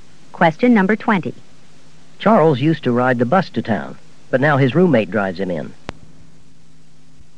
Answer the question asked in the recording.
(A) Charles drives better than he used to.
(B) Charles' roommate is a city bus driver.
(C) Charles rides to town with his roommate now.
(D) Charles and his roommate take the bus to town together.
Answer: (C) Charles rides to town with his roommate now.

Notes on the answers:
Charles used to ride the bus to town, but now his roommate drives him in.

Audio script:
19. It's unusual that the university should offer only one anthropology course.
20. Charles used to ride the bus to town, but now his roommate drives him in.